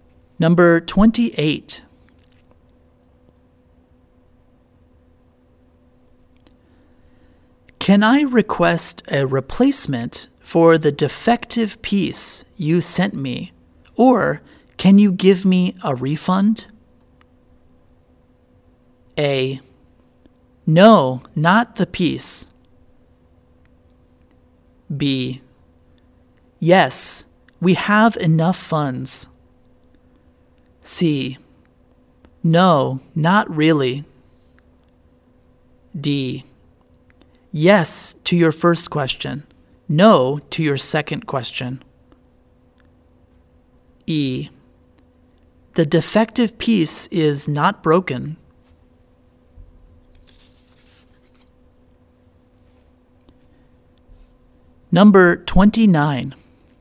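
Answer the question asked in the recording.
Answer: D: Yes to your first question. No to your second question.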